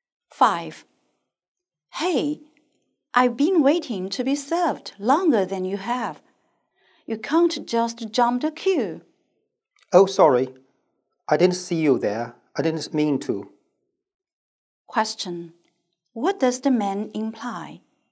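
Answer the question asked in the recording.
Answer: He didn't jump the queue on purpose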